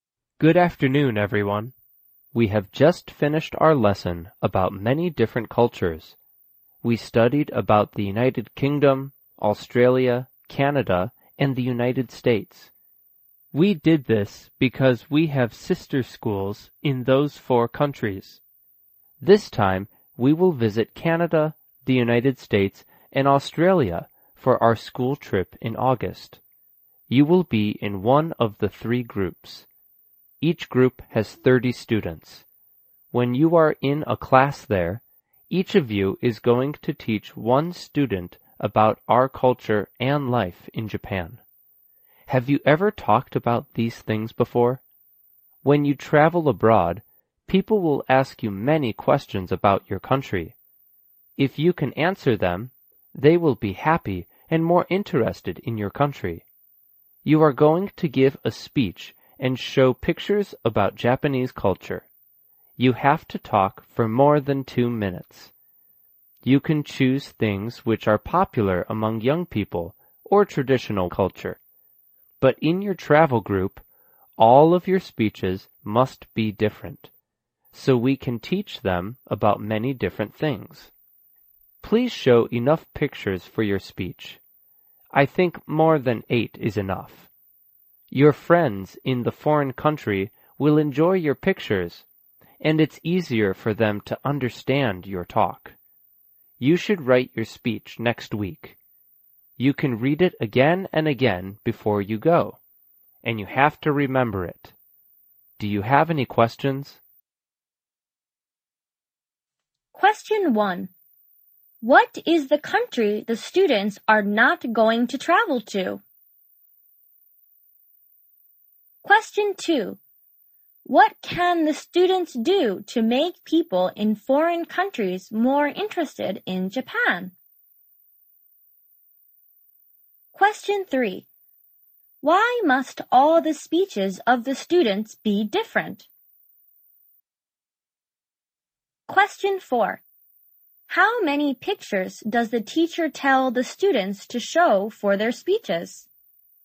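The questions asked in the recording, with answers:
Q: What is the country the students are not going to travel to?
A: The United Kingdom

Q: What can the students do to make people in foreign countries more interested in Japan?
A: Answer their questions about Japan

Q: Why must all the speeches of the students be different?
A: So they can teach them about many different things

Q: How many pictures does the teacher tell the students to show for their speeches?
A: More than 8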